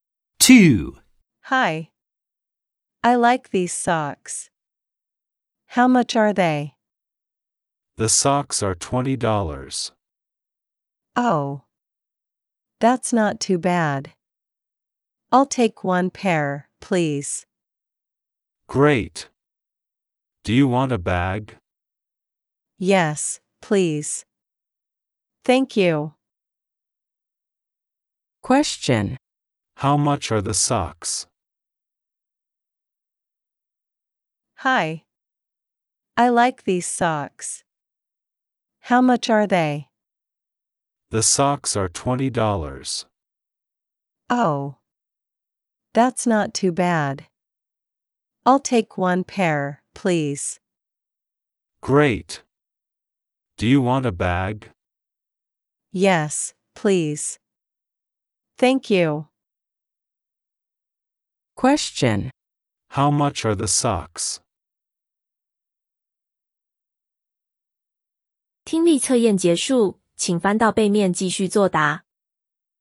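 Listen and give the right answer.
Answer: $20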